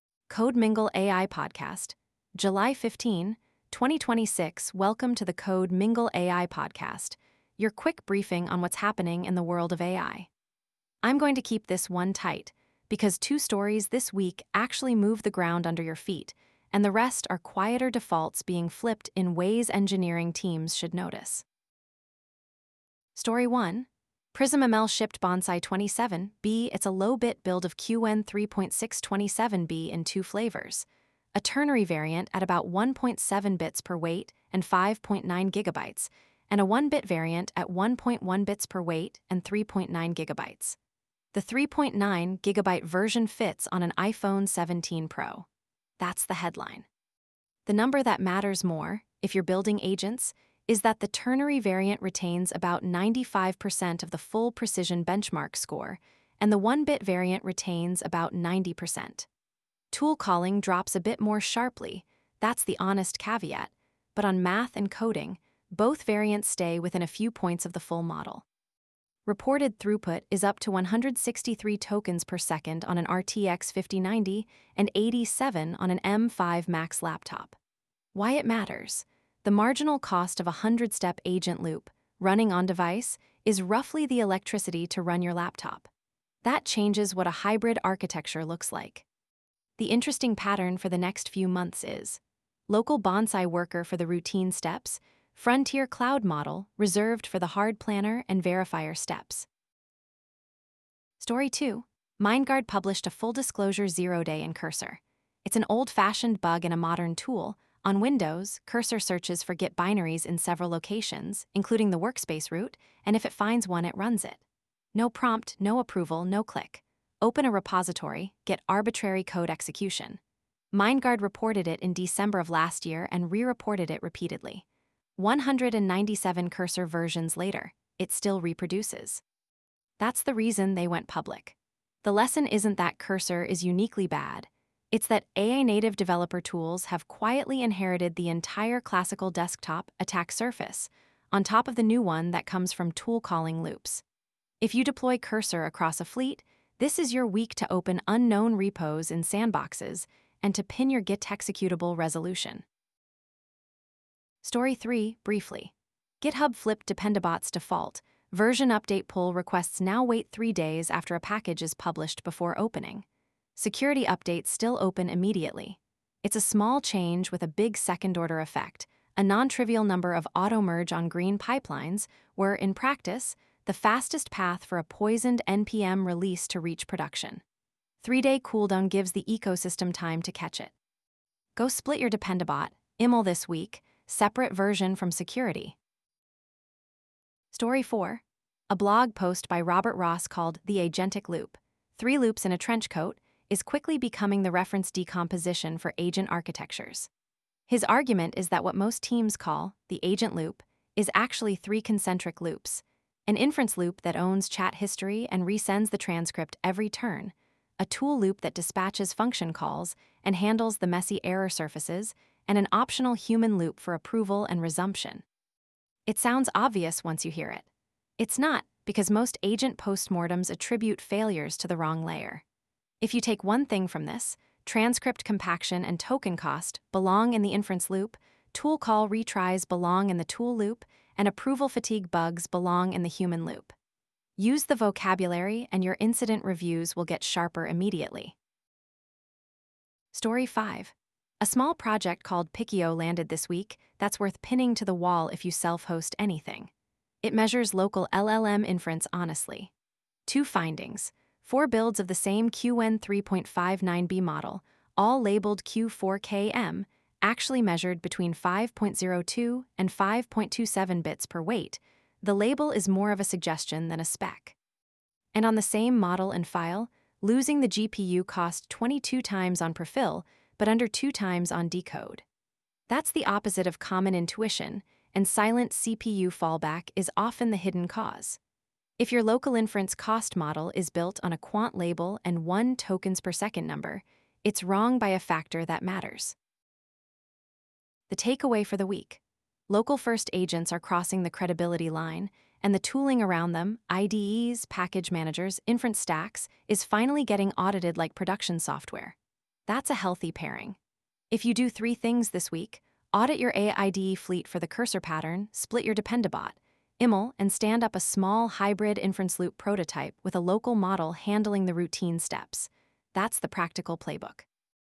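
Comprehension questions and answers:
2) Why is the Cursor git.exe issue disclosed by Mindgard notable beyond being a single vendor bug?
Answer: It is a classical desktop-app RCE (auto-executing a workspace-relative binary with no user interaction) inside an AI-native IDE, unpatched across 197+ versions.

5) According to the picchio project's findings, which statement about local-inference measurement is accurate?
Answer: Four Q4_K_M builds of the same Qwen3.5-9B measured 5.02–5.27 effective bpw, and silent CPU fallback can make a remembered tok/s number impossible to reproduce.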